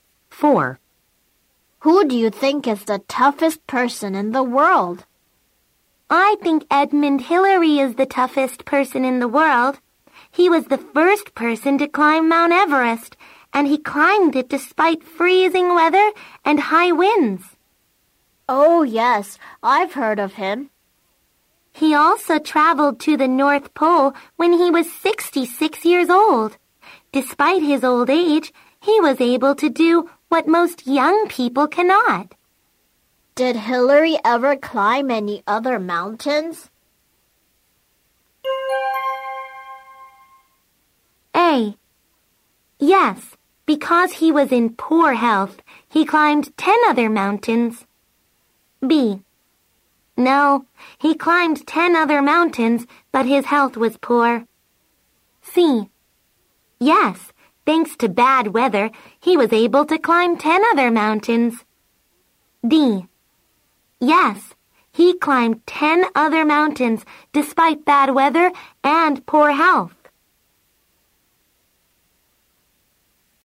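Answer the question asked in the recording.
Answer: D: Yes, he climbed 10 other mountains despite bad weather and poor health.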